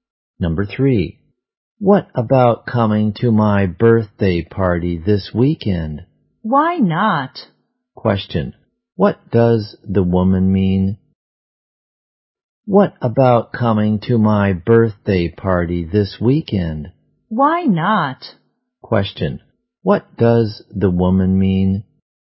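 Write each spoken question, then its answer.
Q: what does the woman mean?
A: She will come to the birthday party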